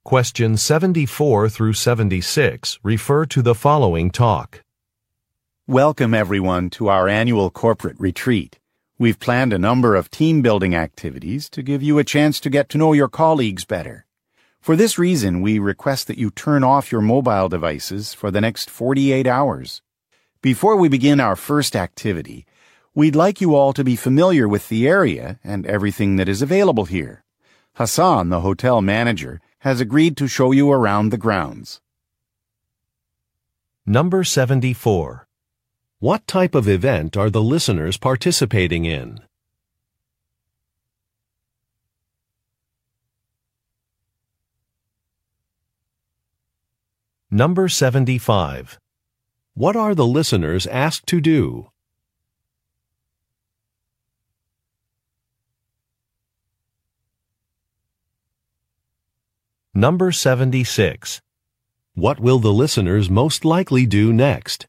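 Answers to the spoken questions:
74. A corporate retreat
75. Turn off their mobile devices
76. Take a tour of the grounds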